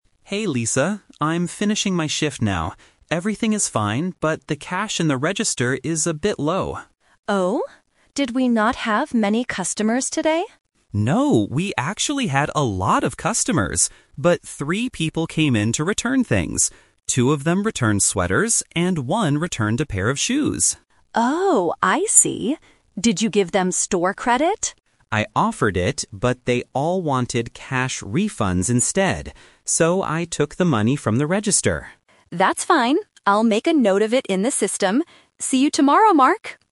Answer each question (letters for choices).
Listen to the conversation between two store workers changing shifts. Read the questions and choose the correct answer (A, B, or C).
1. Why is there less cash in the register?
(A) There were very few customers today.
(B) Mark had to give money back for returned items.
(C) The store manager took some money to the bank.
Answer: B

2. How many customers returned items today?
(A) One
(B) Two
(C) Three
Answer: C

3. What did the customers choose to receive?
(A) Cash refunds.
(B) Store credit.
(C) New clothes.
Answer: A

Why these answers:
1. Mark explains that the cash is low because people came in to return things and wanted cash refunds. Why the trap is wrong: Option (A) is a trap. Lisa asks if they didn't have many customers, but Mark says, "No, we actually had a lot of customers!" Option (C) is plausible in a retail context but is never mentioned.
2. Mark explicitly says, "three people came in to return things." Why the trap is wrong: Options (A) and (B) are numbers mentioned in the audio as details ("Two of them returned sweaters, and one returned a pair of shoes"), making them strong distractors.
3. Mark states, "...they all wanted cash refunds instead." Why the trap is wrong: Option (B) is the "Twist" trap. Lisa asks if Mark gave them "store credit," and Mark says he "offered it, but..." they chose cash instead. Option (C) is not mentioned.

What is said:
Mark: Hey Lisa. I'm finishing my shift now. Everything is fine, but the cash in the register is a bit low.
Lisa: Oh? Did we not have many customers today?
Mark: No, we actually had a lot of customers! But three people came in to return things. Two of them returned sweaters, and one returned a pair of shoes.
Lisa: Oh, I see. Did you give them store credit?
Mark: I offered it, but they all wanted cash refunds instead. So, I took the money from the register.